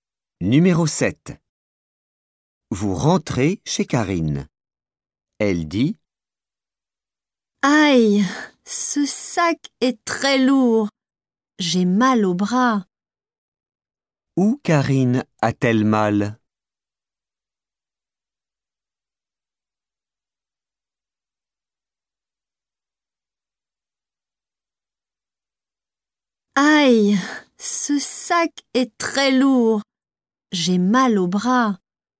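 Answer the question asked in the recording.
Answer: Au bras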